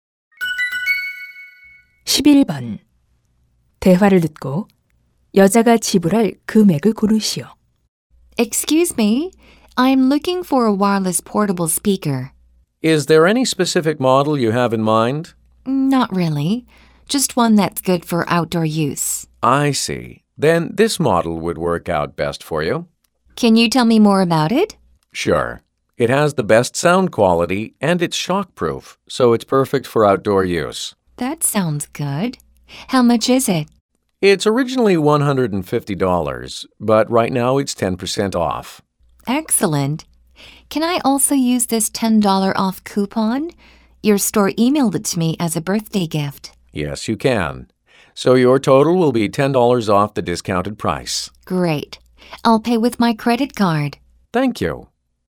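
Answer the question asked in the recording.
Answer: $125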